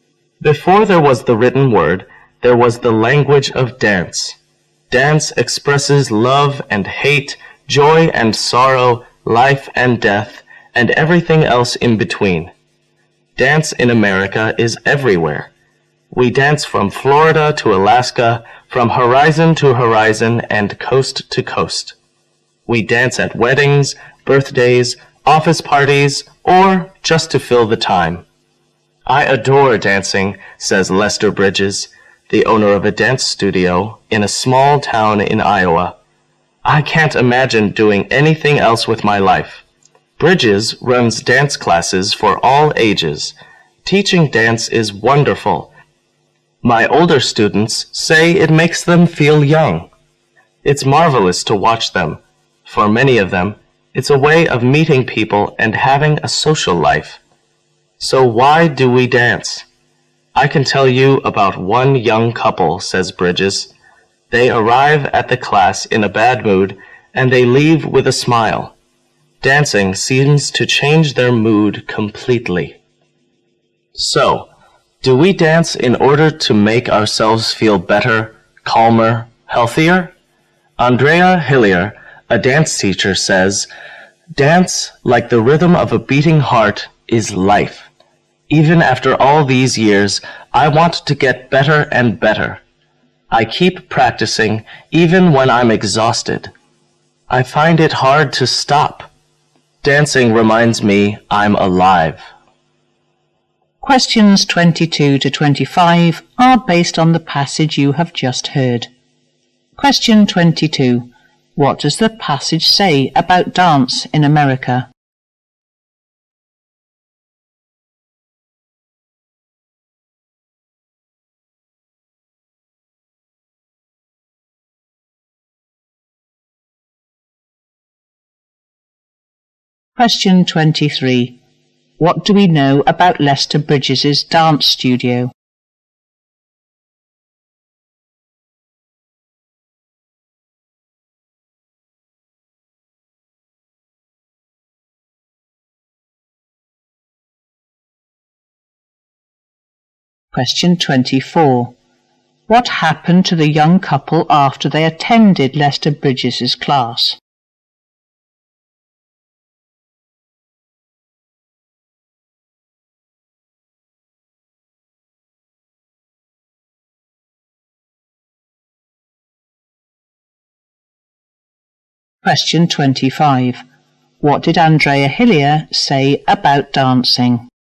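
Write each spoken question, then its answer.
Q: What does the passage say about dance in America?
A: It is everywhere, popular from coast to coast.

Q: What do we know about Lester Bridges' dance studio?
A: It is in a small town in Iowa and runs classes for all ages.

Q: What happened to the young couple after they attended Lester Bridges' class?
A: Their mood changed completely; they left with a smile.

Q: What did Andrea Hillier say about dancing?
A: Dance is life; it reminds her she's alive.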